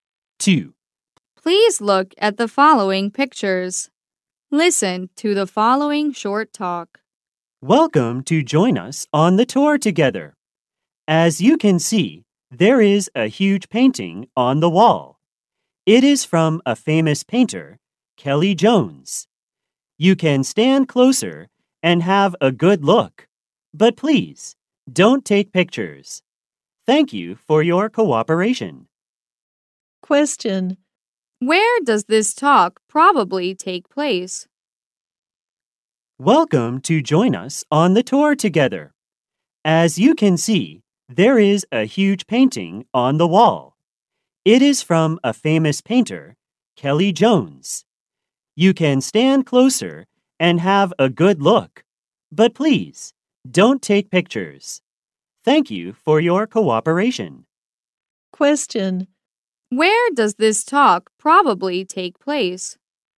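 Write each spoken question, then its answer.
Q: Where does this talk probably take place?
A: In a museum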